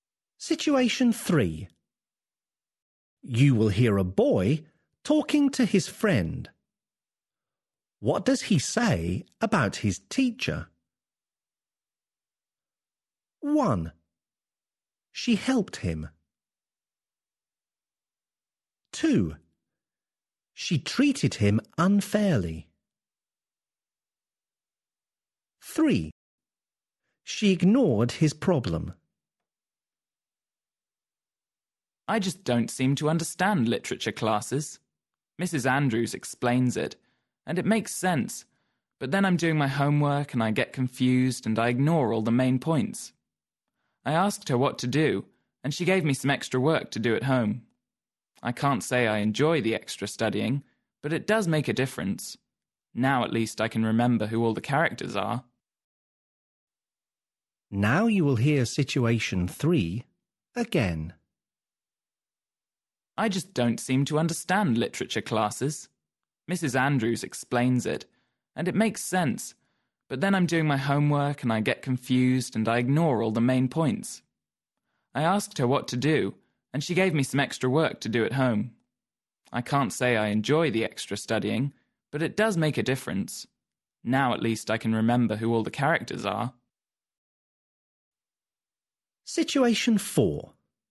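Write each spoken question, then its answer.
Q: What does he say about his teacher?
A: 1: She helped him.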